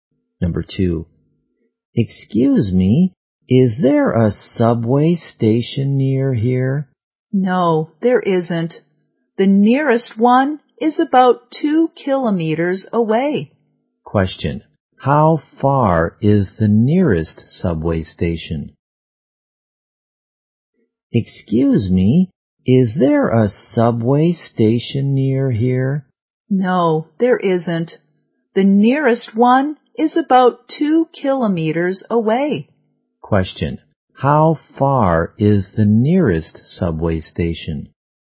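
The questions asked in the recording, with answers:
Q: How far is the nearest subway station?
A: About 2 kilometers away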